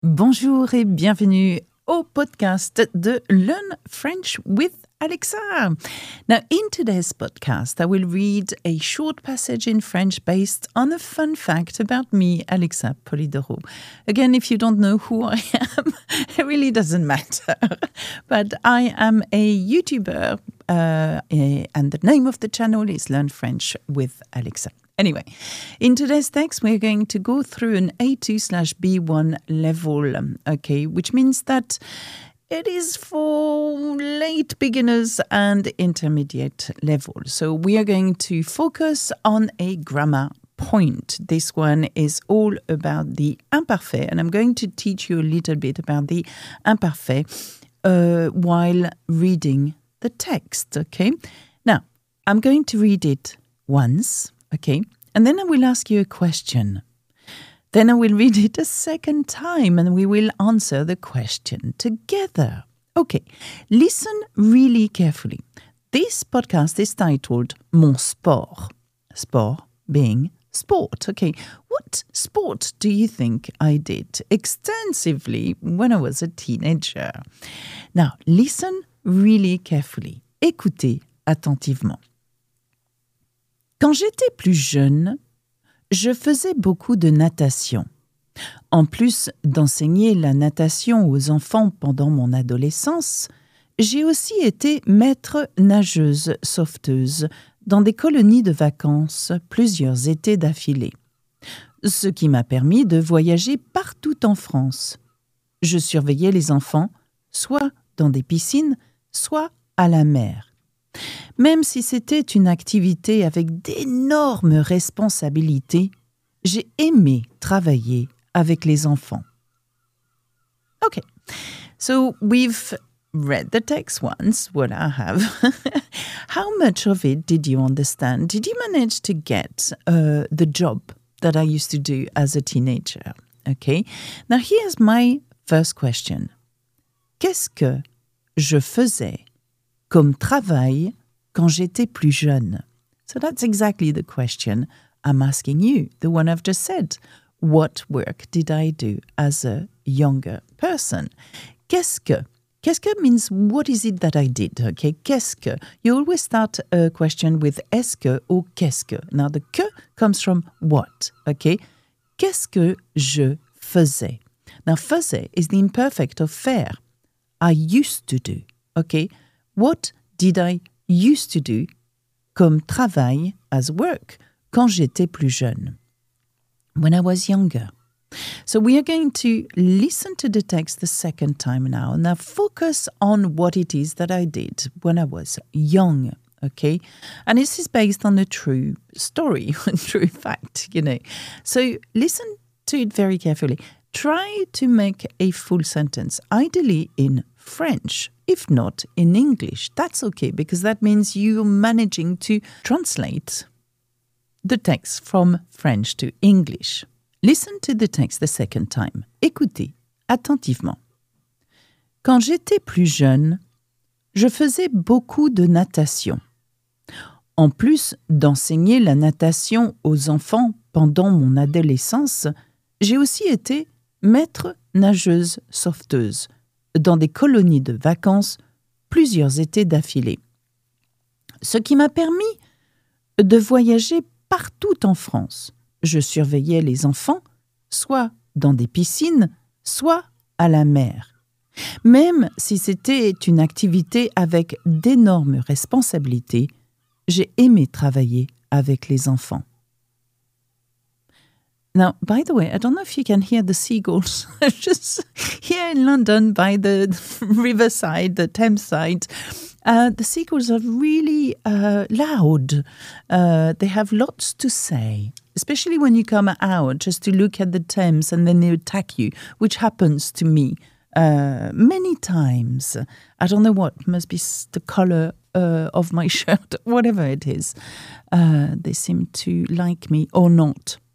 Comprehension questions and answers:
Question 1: Quel était le travail d'Alexa quand elle était plus jeune ?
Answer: Quand Alexa était plus jeune, elle était maître-nageuse sauveteuse.

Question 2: Qu'est-ce que ça lui a permis de faire ?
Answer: Ça lui a permis de voyager partout en France.